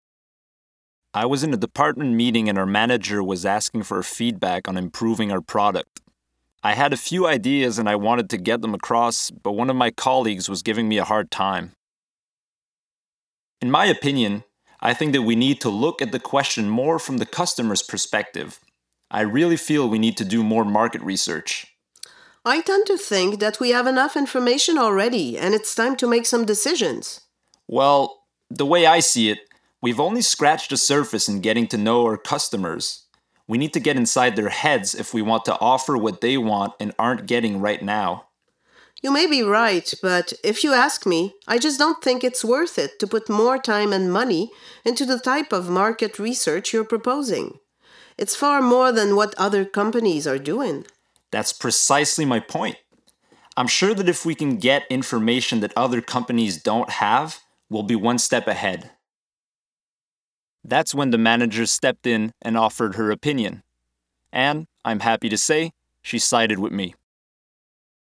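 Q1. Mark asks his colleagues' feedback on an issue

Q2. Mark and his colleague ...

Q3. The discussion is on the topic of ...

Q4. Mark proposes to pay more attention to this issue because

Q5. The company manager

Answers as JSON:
{"1": "False – the manager asks for feedback", "2": "disagree", "3": "improving their product (market research)", "4": "getting information other companies don't have would put them one step ahead", "5": "sided with Mark"}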